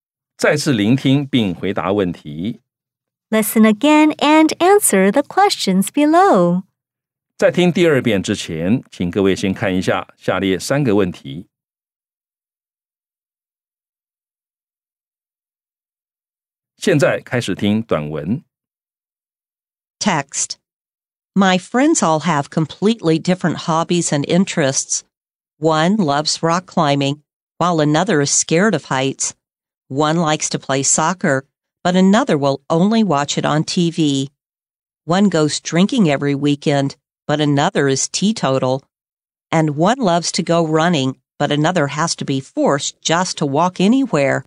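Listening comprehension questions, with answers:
再次聆聽並回答問題 Listen again and answer the questions below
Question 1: Do the speaker's friends have the same hobby?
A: No, they have completely different hobbies and interests.

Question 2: Does the speaker have a friend who doesn't drink?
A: Yes, one friend is teetotal.

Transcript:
My friends all have completely different hobbies and interests. One loves rock climbing, while another is scared of heights. One likes to play soccer, but another will only watch it on TV. One goes drinking every weekend, but another is teetotal. And one loves to go running, but another has to be forced just to walk anywhere!

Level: 中階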